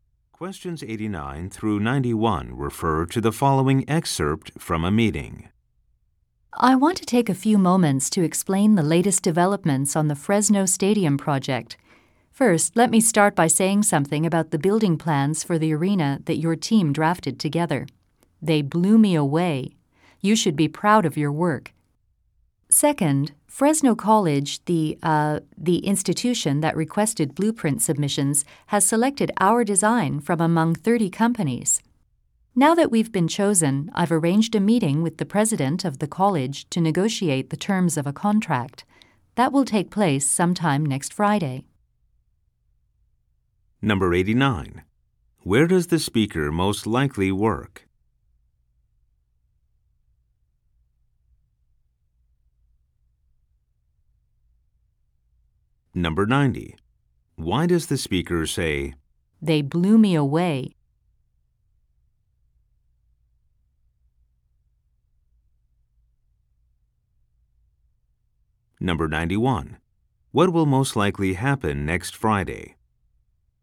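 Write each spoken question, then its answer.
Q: Where does the speaker most likely work?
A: At a design or architecture firm

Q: Why does the speaker say, "They blew me away"?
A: To praise the team's building plans

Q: What will most likely happen next Friday?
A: A contract meeting with the college president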